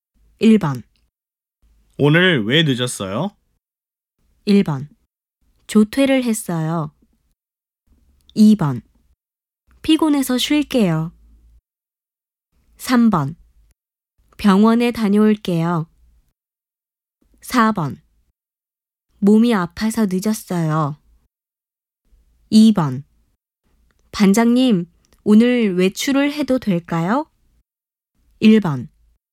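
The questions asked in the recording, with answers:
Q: 오늘 왜 늦었어요?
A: 4: 몸이 아파서 늦었어요.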